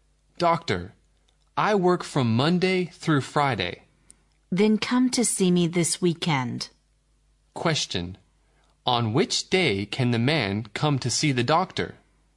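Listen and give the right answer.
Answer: At the weekend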